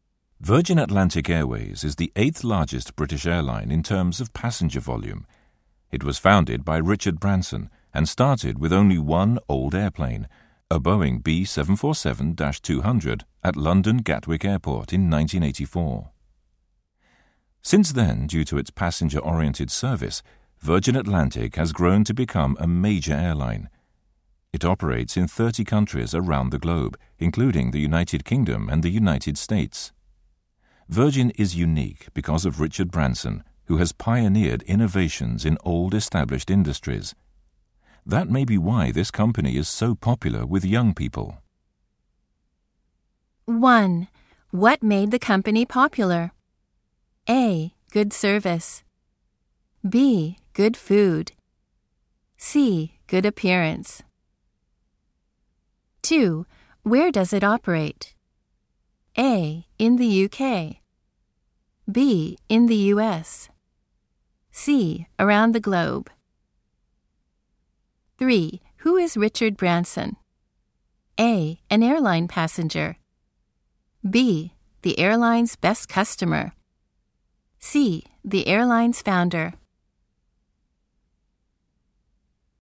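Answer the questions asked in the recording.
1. A: Good service.
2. C: Around the globe.
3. C: The airline's founder.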